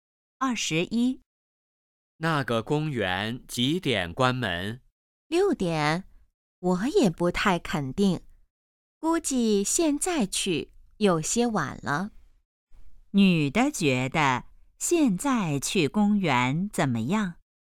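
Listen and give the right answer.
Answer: 有些晚了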